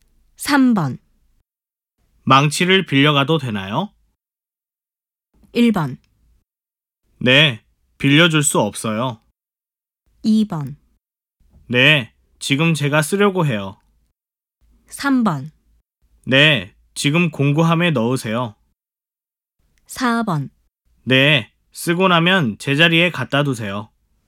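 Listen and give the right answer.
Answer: 4: 네, 쓰고 나면 제자리에 갖다 두세요.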